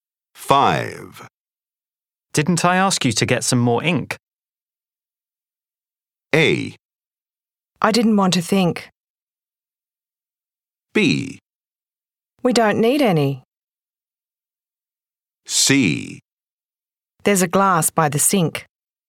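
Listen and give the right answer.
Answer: B: We don't need any.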